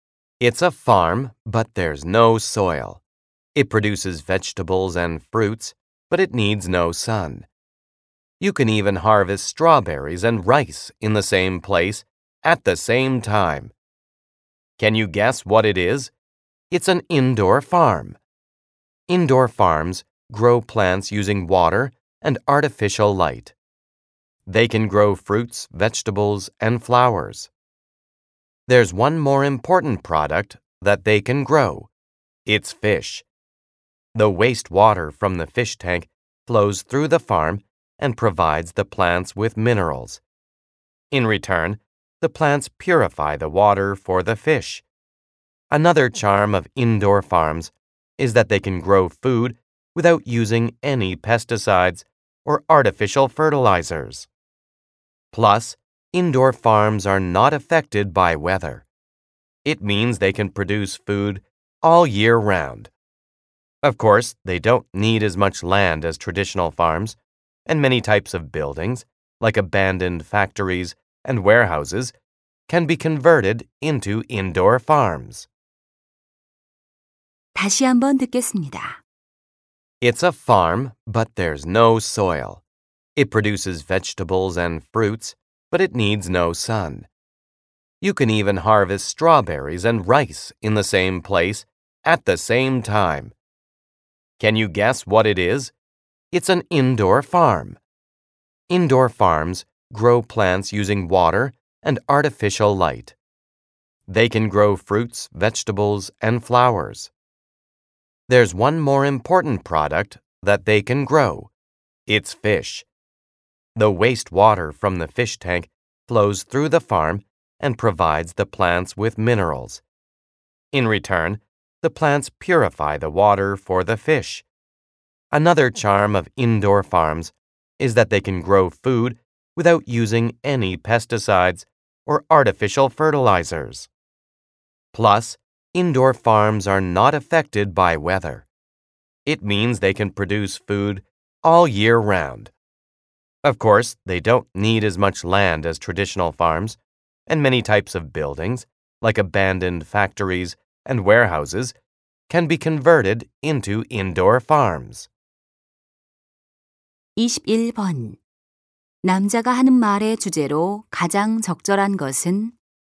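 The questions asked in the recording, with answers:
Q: 남자가 하는 말의 주제로 가장 적절한 것은?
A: 실내 농장의 특징과 장점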